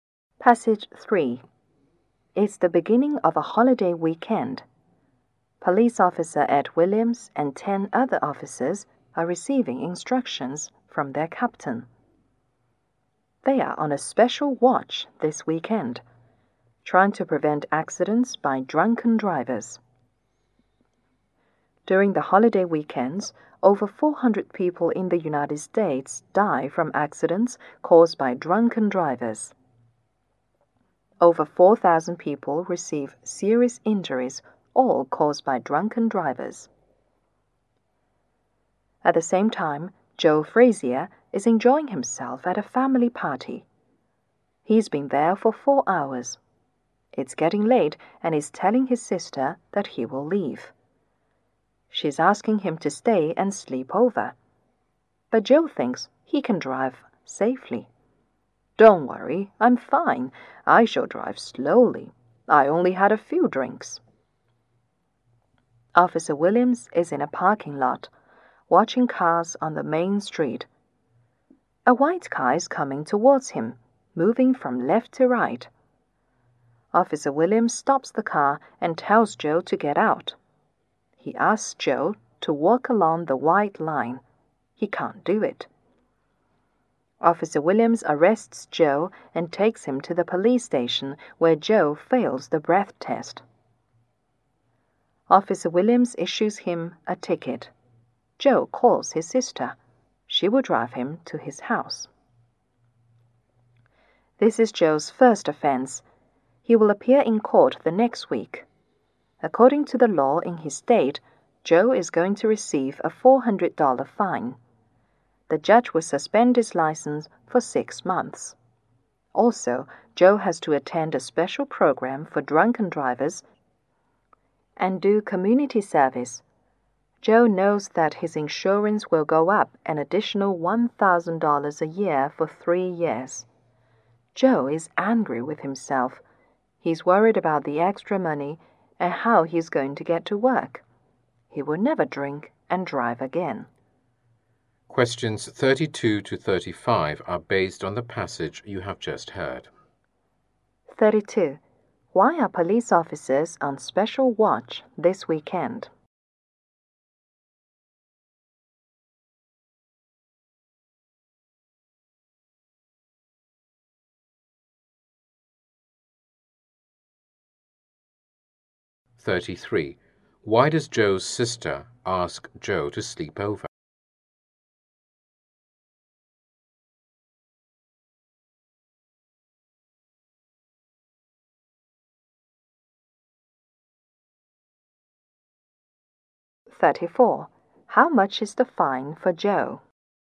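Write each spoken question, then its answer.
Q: Why are police officers on special watch this weekend?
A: To prevent accidents caused by drunken drivers

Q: How much is the fine for Joe?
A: $400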